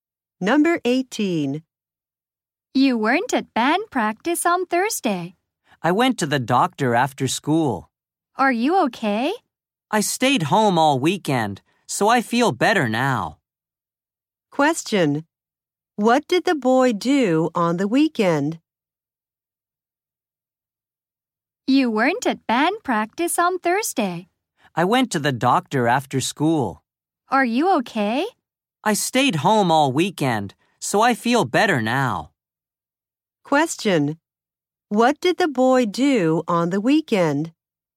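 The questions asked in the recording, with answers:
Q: What did the boy do on the weekend?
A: He stayed home.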